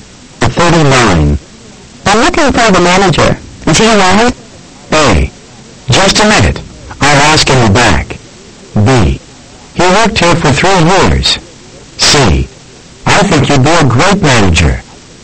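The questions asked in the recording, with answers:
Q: I'm looking for the manager.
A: A: Just a minute. I'll ask him back.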